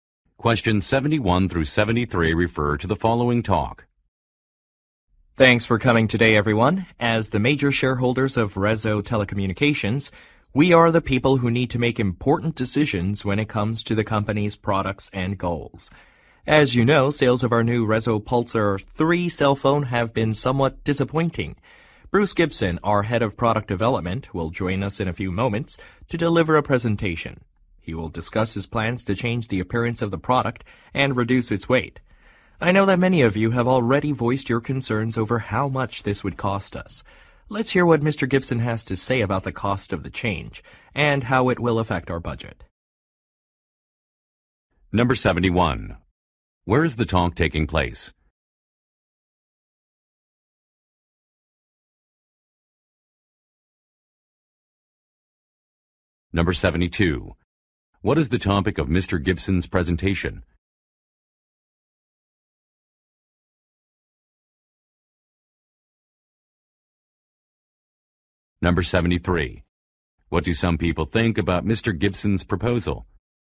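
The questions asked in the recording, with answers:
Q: Where is the talk taking place?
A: At a meeting of Rezo Telecommunications' major shareholders

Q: What is the topic of Mr. Gibson's presentation?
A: Plans to change the Pulsar 3 phone's appearance and make it lighter

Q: What do some people think about Mr. Gibson's proposal?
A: They are worried about how much it will cost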